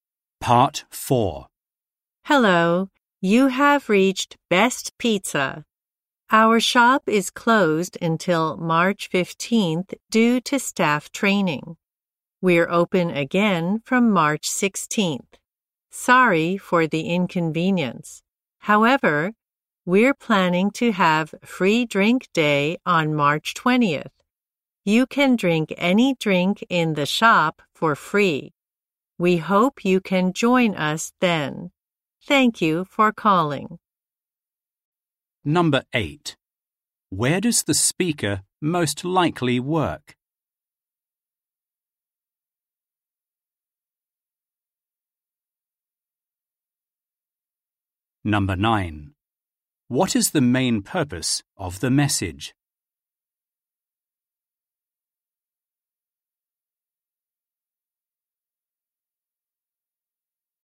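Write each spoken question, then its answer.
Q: Where does the speaker most likely work?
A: At a pizza shop

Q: What is the main purpose of the message?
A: To say the shop is closed until March 15th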